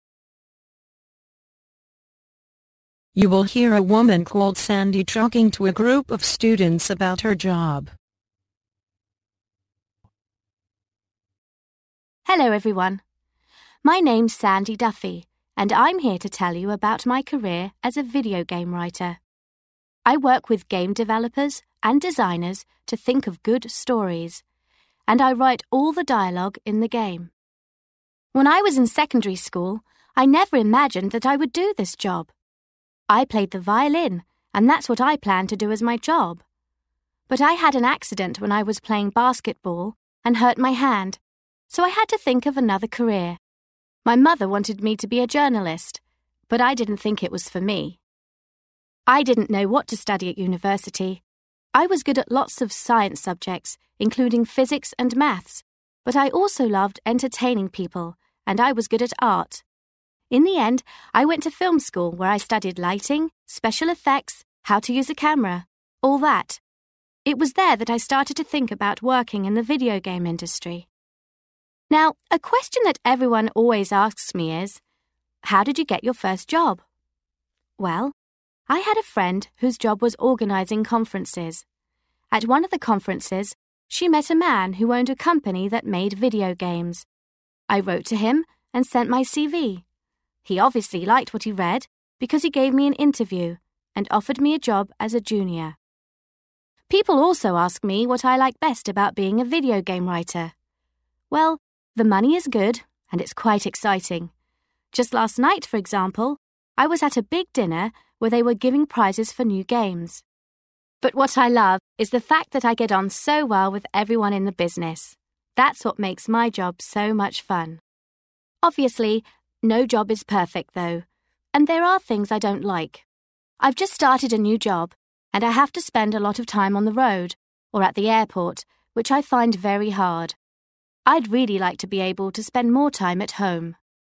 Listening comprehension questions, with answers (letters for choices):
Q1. What did Sandy Duffy want to be when she was at school?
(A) A journalist.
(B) A musician.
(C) A director.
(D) A basketball player.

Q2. What did Sandy study at university?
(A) Math and Physics.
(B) Film making.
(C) Technology.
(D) Art.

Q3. How did Sandy get her first job as a video game writer?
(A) She answered a job advertisement.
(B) She met someone at a conference.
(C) She sent some information about herself to a company.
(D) She was invited by a friend.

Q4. What does Sandy like best about being a video game writer?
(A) The prizes she has won.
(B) The high salary.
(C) The people she works with.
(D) The great working condition.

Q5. What does Sandy dislike about being a video game writer?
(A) She has to travel a lot.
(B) She has to work long hours.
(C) She often has to change her job.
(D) She has to live far from home.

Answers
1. B
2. B
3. C
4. C
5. A

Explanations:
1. Thông tin: I played the violin, and that's what I planned to do as my job. (Tôi chơi vĩ cầm, và đó là điều tôi dự định sẽ làm sau này.)
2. Thông tin: In the end, I went to film school where I studied lighting, special effects, how to use a camera, all that. (Cuối cùng, tôi đã vào trường điện ảnh, nơi tôi học về ánh sáng, hiệu ứng đặc biệt, cách sử dụng máy quay phim, tất cả những thứ đó.)
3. (Bây giờ, một câu hỏi mà mọi người luôn hỏi tôi là, làm thế nào bạn có được công việc đầu tiên? Chà, tôi có một người bạn làm công việc tổ chức hội nghị. Tại một trong những hội nghị đó, cô ấy gặp một người đàn ông sở hữu một công ty sản xuất trò chơi điện tử. Tôi đã viết thư cho ông ấy và gửi CV của mình.)
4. Thông tin: But what I love is the fact that I get on so well with everyone in the business. (Nhưng điều tôi yêu thích nhất là tôi hòa hợp rất tốt với mọi người trong ngành.)
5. (Rõ ràng là không có công việc nào hoàn hảo cả, và có những điều tôi không thích. Tôi vừa mới bắt đầu một công việc mới và phải dành rất nhiều thời gian trên đường hoặc ở sân bay, điều này khiến tôi rất khó khăn.)

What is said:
Hello everyone. My name's Sandy Duffy, and I'm here to tell you about my career as a video game writer. I work with game developers and designers to think of good stories, and I write all the dialogue in the game. When I was in secondary school, I never imagined that I would do this job. I played the violin, and that's what I planned to do as my job. But I had an accident when I was playing basketball and hurt my hand, so I had to think of another career. My mother wanted me to be a journalist, but I didn't think it was for me. I didn't know what to study at university. I was good at lots of science subjects, including physics and maths, but I also loved entertaining people, and I was good at art. In the end, I went to film school where I studied lighting, special effects, how to use a camera, all that. It was there that I started to think about working in the video game industry. Now, a question that everyone always asks me is, how did you get your first job? Well, I had a friend whose job was organising conferences. At one of the conferences, she met a man who owned a company that made video games. I wrote to him and sent my CV. He obviously liked what he read because he gave me an interview and offered me a job as a junior. People also ask me what I like best about being a video game writer. Well, the money is good and it's quite exciting. Just last night, for example, I was at a big dinner where they were giving prizes for new games. But what I love is the fact that I get on so well with everyone in the business. That's what makes my job so much fun. Obviously, no job is perfect though, and there are things I don't like. I've just started a new job and I have to spend a lot of time on the road or at the airport, which I find very hard. I'd really like to be able to spend more time at home.

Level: Vận dụng